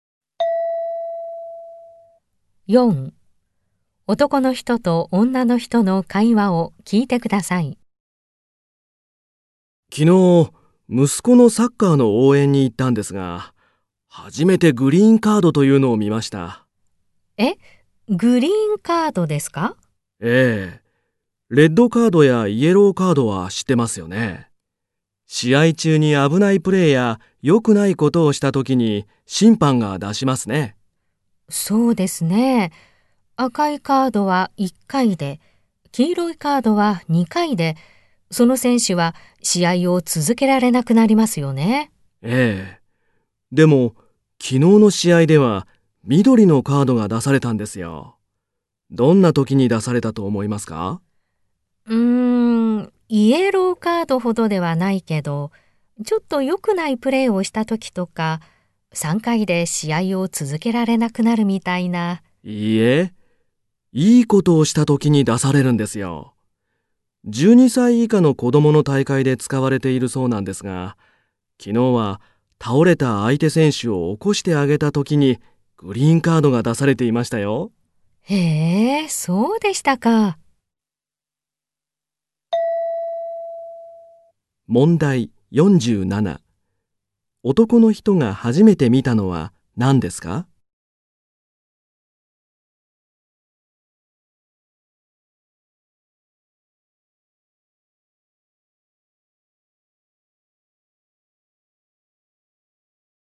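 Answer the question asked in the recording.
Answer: グリーンカード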